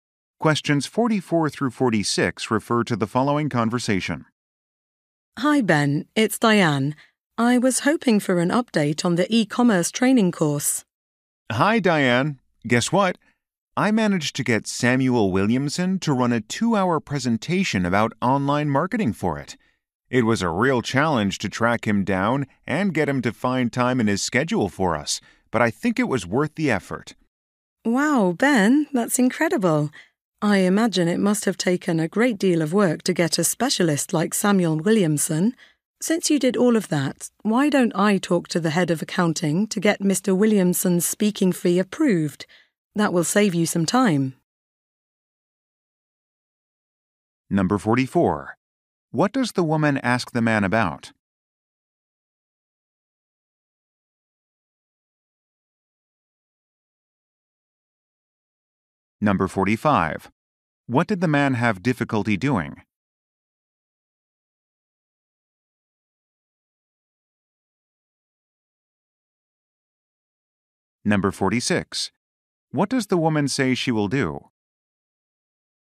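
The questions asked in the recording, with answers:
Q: What does the woman ask the man about?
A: An update on the e-commerce training course

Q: What did the man have difficulty doing?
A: Getting Samuel Williamson to make time to speak

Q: What does the woman say she will do?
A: Talk to the head of accounting to get the speaking fee approved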